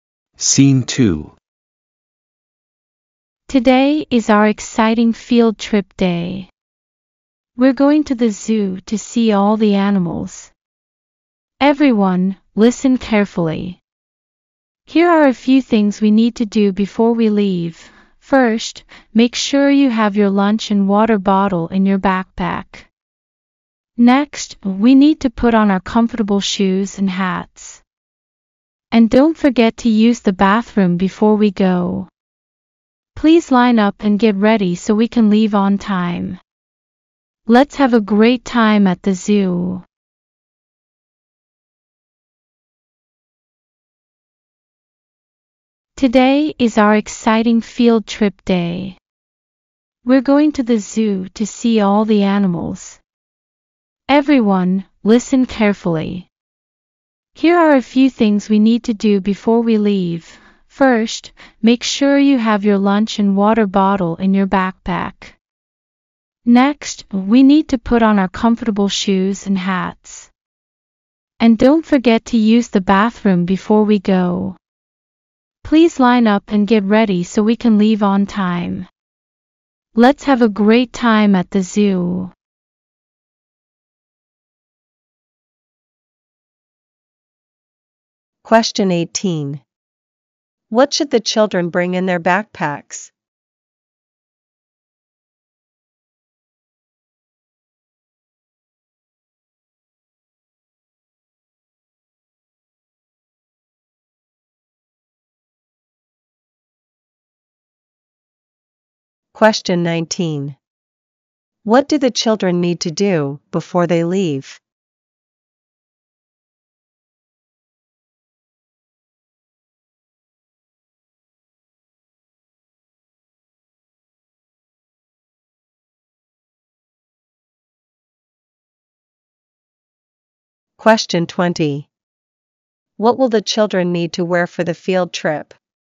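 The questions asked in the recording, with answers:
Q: What should the children bring in their backpacks?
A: Their lunch and water bottle

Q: What will the children need to wear for the field trip?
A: Comfortable shoes and hats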